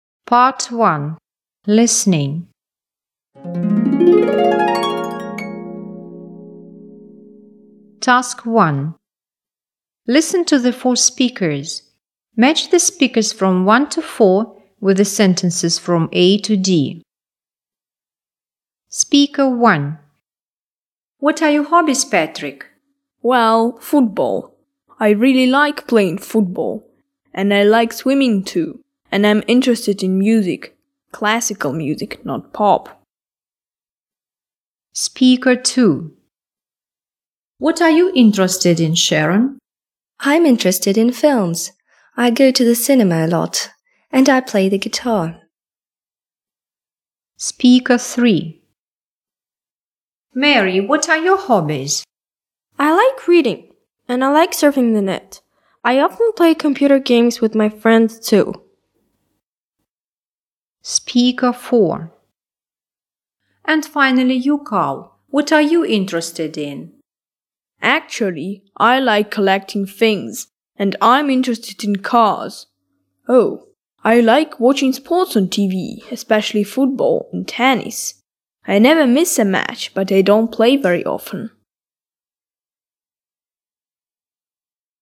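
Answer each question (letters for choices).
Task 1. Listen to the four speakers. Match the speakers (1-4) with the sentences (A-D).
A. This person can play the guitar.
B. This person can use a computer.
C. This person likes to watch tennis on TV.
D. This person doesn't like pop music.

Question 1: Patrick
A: D

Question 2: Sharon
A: A

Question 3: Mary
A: B

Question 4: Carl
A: C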